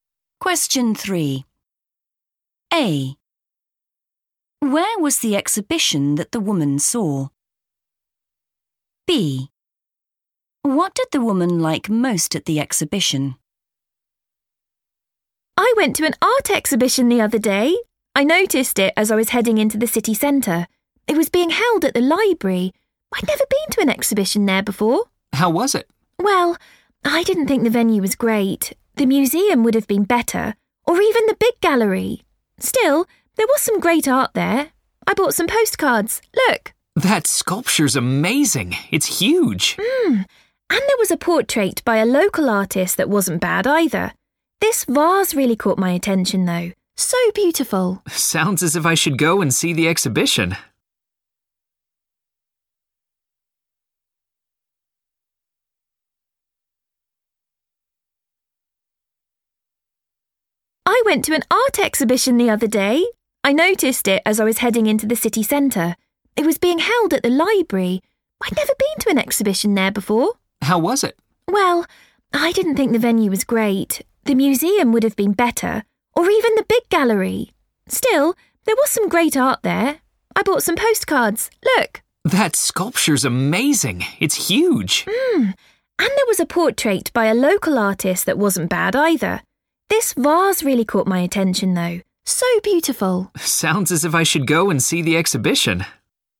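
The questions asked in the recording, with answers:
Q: Where was the exhibition that the woman saw?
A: at the library

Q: What did the woman like most at the exhibition?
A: the vase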